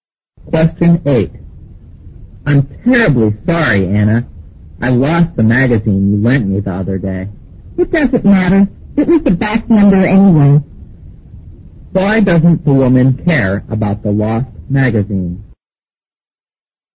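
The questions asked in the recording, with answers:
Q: Why doesn't the woman care about the lost magazine?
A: It was an old issue (a back number).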